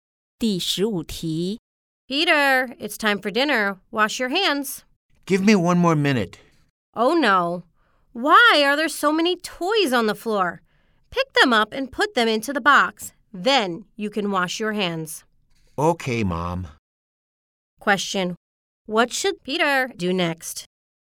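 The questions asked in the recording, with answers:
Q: What should Peter do next?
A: Pick up the toys and put them into the box.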